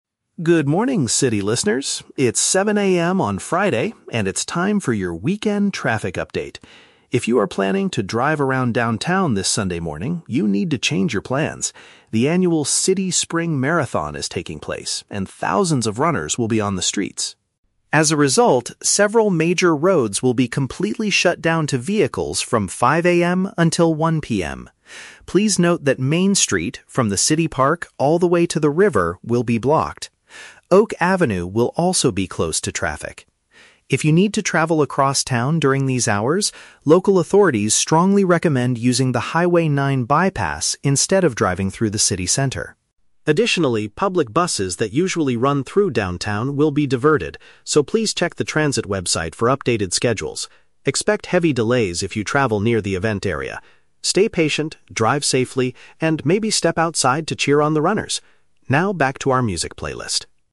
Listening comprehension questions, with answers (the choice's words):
Listen to a radio traffic announcement and choose the correct answer (A, B, or C) for each question.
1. Why will several city streets be closed this Sunday?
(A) The local government is fixing the roads near the park.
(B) A large community running competition is happening.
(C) A special spring parade will march towards the river.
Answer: A large community running competition is happening.

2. What does the announcer advise car drivers to do?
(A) Park their vehicles near the river before 5 AM.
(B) Drive very slowly on Main Street and Oak Avenue.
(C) Take an alternative route outside the downtown area.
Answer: Take an alternative route outside the downtown area.

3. What is mentioned about public transportation during the event?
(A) City buses will travel on different paths than usual.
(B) The trains will experience heavy delays all morning.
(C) Passengers can use the transit system for free on Sunday.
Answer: City buses will travel on different paths than usual.

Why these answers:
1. The announcer says the "City Spring Marathon is taking place" and "thousands of runners will be on the streets." Option (B) uses paraphrasing ("Marathon/runners" = running competition). Option (A) is a logical guess for road closures, but road fixing is not mentioned. Option (C) is a trap; "spring" and "river" are mentioned in the audio, but the event is a marathon, not a parade.
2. The announcer strongly recommends "using the Highway 9 bypass instead of driving through the city center." Option (C) paraphrases this perfectly ("bypass" = alternative route, "instead of city center" = outside the downtown area). Option (A) is a trap; 5 AM and the river are mentioned, but not about parking. Option (B) is a trap; you cannot drive slowly on those streets because they are "completely shut down."
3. The speaker says that "public buses that usually run through downtown will be diverted" (diverted means forced to take a different route). Option (A) accurately paraphrases this. Option (B) is a trap; "heavy delays" are mentioned, but for drivers near the event, and the audio talks about buses, not trains. Option (C) is a plausible idea for a festival day, but free tickets are never mentioned.

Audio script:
Radio Announcer: Good morning, city listeners! It's 7 AM on Friday, and it's time for your weekend traffic update. If you are planning to drive around downtown this Sunday morning, you need to change your plans. The annual City Spring Marathon is taking place, and thousands of runners will be on the streets.
As a result, several major roads will be completely shut down to vehicles from 5 AM until 1 PM. Please note that Main Street, from the city park all the way to the river, will be blocked. Oak Avenue will also be closed to traffic. If you need to travel across town during these hours, local authorities strongly recommend using the Highway 9 bypass instead of driving through the city center.
Additionally, public buses that usually run through downtown will be diverted, so please check the transit website for updated schedules. Expect heavy delays if you travel near the event area. Stay patient, drive safely, and maybe step outside to cheer on the runners! Now, back to our music playlist.